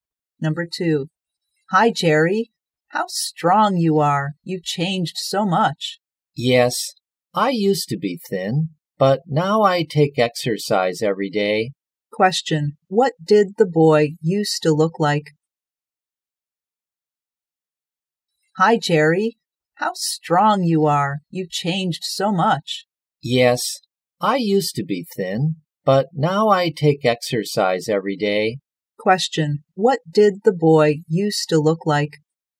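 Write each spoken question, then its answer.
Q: Question, what did the boy used to look like?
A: Thin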